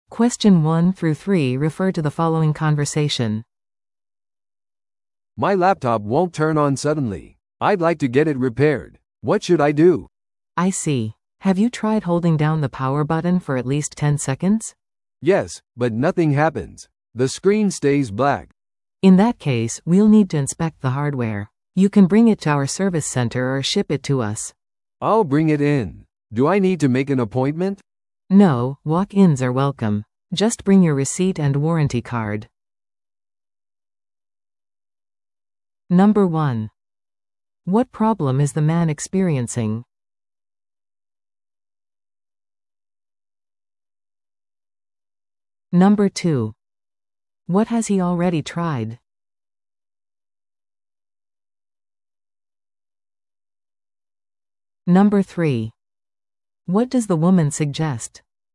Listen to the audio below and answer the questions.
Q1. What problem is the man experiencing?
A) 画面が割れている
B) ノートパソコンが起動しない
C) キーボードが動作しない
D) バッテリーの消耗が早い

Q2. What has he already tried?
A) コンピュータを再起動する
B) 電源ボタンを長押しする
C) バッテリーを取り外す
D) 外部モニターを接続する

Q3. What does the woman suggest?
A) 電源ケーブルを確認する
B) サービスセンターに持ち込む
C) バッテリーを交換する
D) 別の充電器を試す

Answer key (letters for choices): 1B, 2B, 3B

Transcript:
A: "My laptop won't turn on suddenly. I'd like to get it repaired. What should I do?"
B: "I see. Have you tried holding down the power button for at least ten seconds?"
A: "Yes, but nothing happens. The screen stays black."
B: "In that case, we'll need to inspect the hardware. You can bring it to our service center or ship it to us."
A: "I'll bring it in. Do I need to make an appointment?"
B: "No, walk-ins are welcome. Just bring your receipt and warranty card."